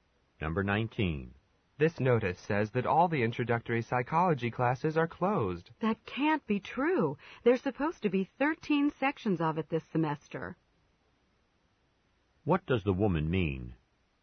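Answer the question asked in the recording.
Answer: She doubts the notice is correct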